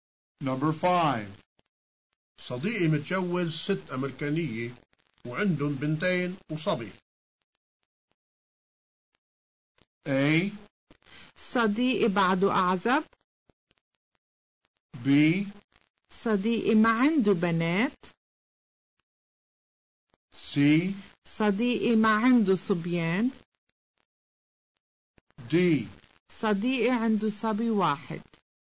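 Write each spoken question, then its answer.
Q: صديقي متجوز 6 أمريكانية وعندهم بنتين وصبي.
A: D: صديقي عنده صبي واحد.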